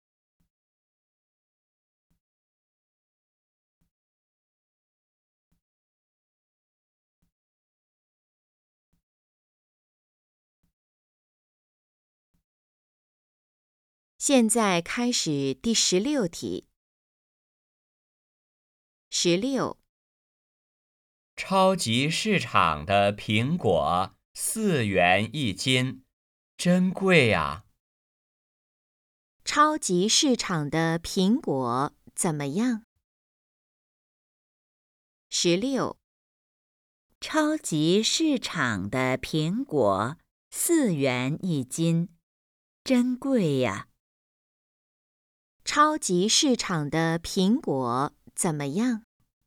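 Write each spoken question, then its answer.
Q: 超级市场的苹果怎么样?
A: 很贵(4元一斤)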